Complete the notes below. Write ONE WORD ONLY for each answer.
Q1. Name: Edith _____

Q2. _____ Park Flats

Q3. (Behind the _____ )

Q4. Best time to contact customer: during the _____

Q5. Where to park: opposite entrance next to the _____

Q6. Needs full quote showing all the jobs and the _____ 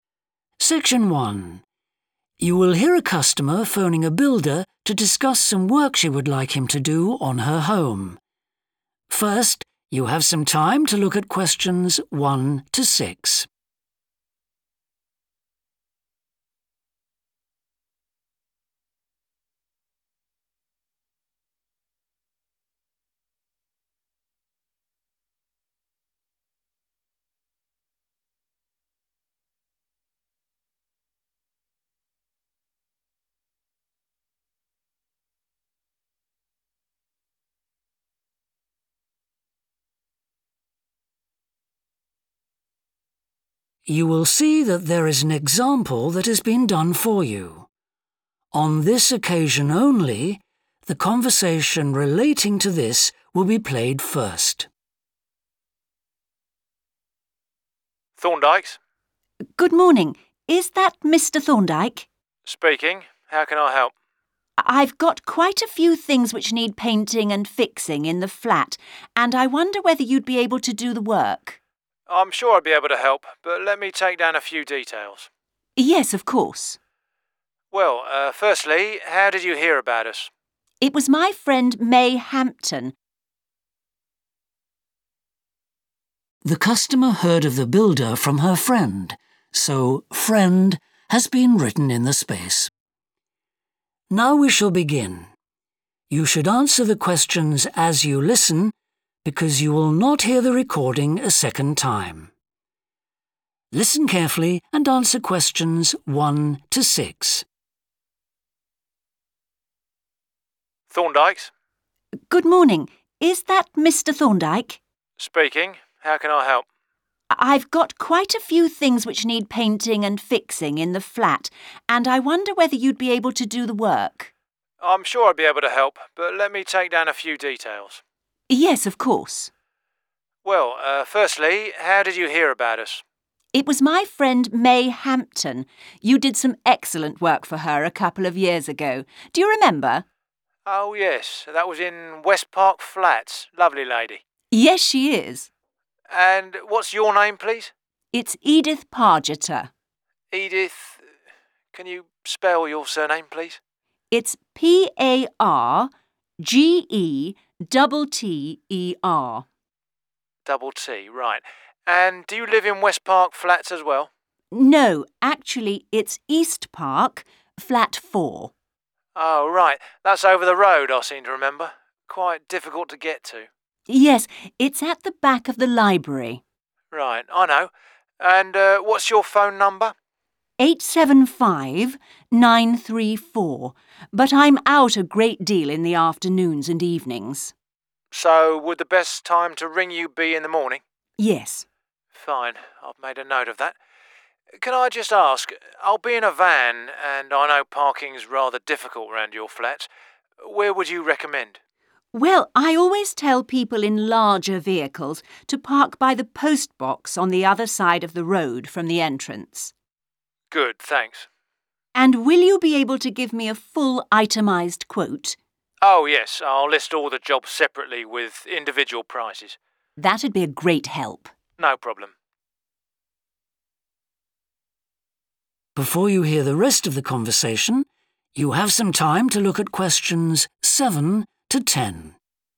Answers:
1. Pargetter
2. East
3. library
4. morning / mornings
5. postbox
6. prices

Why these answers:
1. The correct answer is 'Pargetter' because it matches the last name provided in the transcript, confirming that Edith's full name is Edith Pargetter.
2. The correct answer aligns with the provided information in the excerpt as it specifies the direction of the location mentioned in the address, confirming that it is in East Park.
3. The correct answer matches the description in the excerpt, indicating that the building is situated behind the library. 'Library' is a common term for a place where books are stored and available for borrowing, which fits the context provided in the transcript.
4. The correct answer is 'morning' because the excerpt is asking about the best time to call Edith, and the excerpt also has the word 'morning' in it.
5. The correct answer is 'postbox' because it matches the location reference given in the excerpt, providing a clear and recognizable point for parking guidance.
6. The correct answer aligns with the customer's statement about listing 'individual prices' for each job, indicating that a full quote will include all the jobs and their corresponding prices.